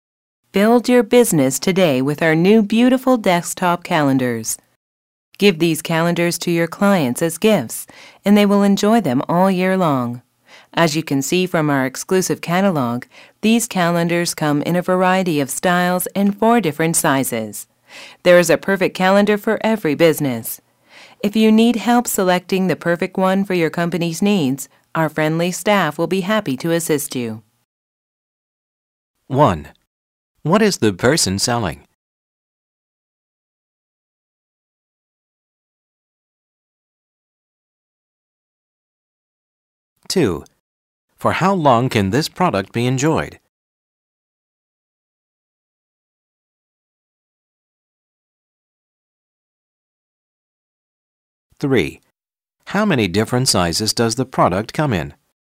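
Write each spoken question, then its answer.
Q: What is the person selling?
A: Desktop calendars

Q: For how long can this product be enjoyed?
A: All year long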